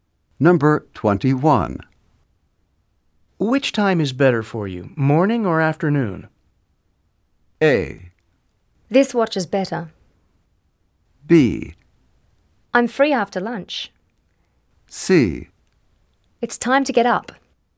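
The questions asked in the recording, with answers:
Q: Which time is better for you, morning or afternoon?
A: B: I'm free after lunch.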